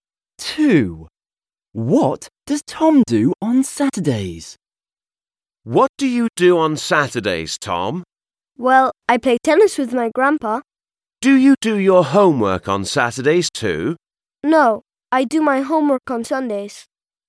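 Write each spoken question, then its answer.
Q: What does Tom do on Saturdays?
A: He plays tennis with his grandpa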